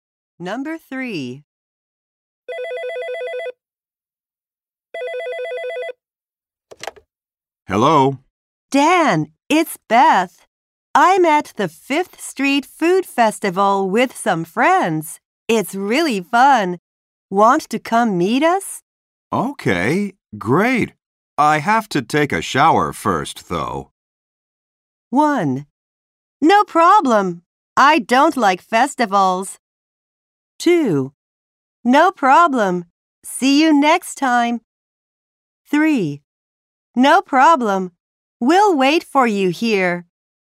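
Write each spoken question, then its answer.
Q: Okay, great. I have to take a shower first, though.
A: 3: No problem. We'll wait for you here.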